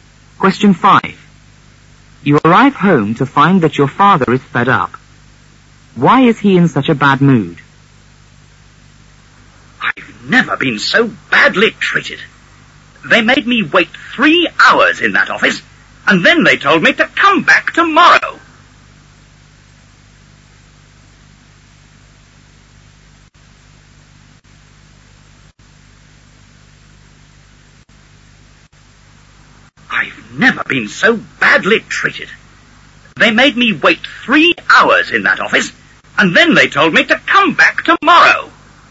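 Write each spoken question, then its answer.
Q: Why is he in such a bad mood?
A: He waited 3 hours in an office and was told to come back tomorrow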